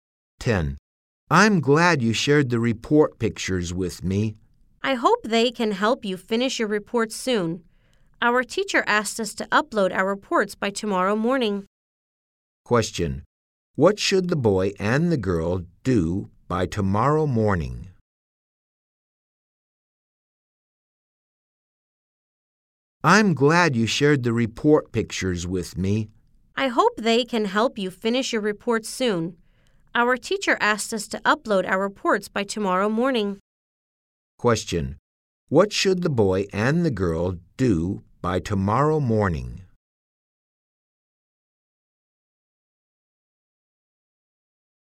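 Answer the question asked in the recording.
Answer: Upload their reports.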